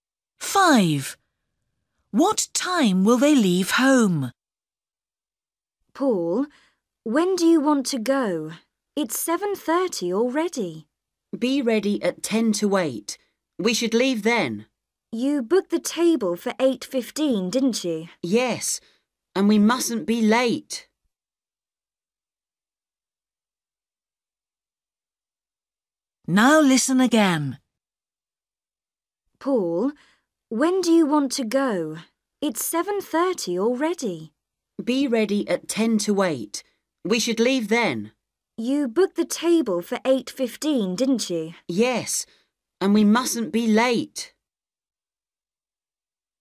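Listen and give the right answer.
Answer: 7:50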